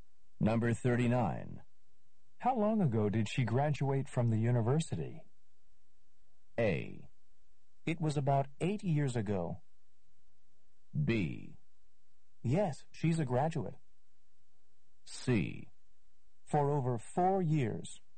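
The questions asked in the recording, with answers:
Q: How long ago did she graduate from the university?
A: A: It was about 8 years ago.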